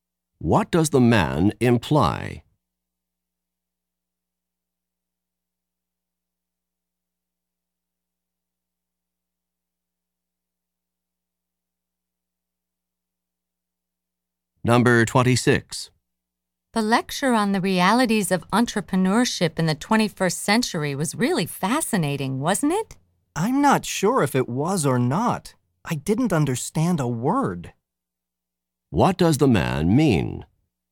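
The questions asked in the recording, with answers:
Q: What does the man mean?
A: He didn't understand the lecture.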